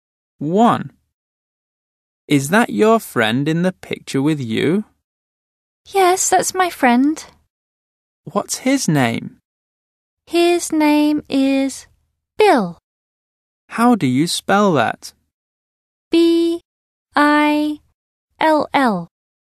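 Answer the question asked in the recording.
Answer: Bill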